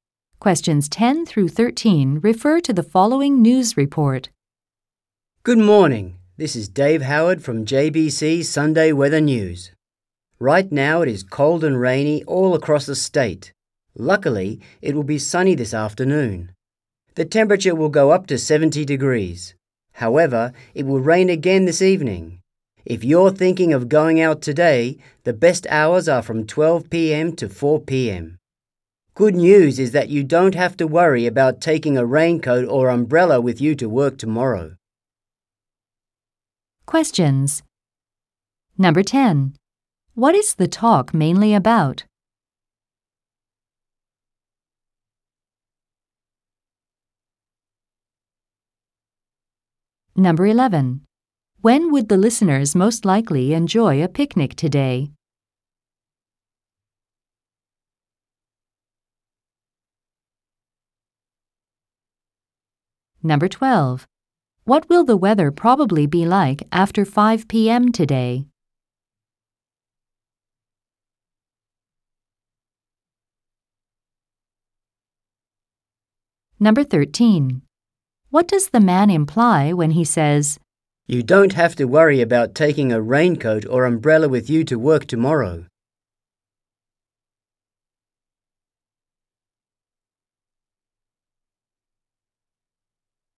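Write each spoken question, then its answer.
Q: What is the talk mainly about?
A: The weather forecast

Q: When would the listeners most likely enjoy a picnic today?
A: From 12 p.m. to 4 p.m. (this afternoon)

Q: What will the weather probably be like after 5 p.m. today?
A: Rainy

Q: What does the man imply when he says, "You don't have to worry about taking a raincoat or umbrella with you to work tomorrow."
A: It will not rain tomorrow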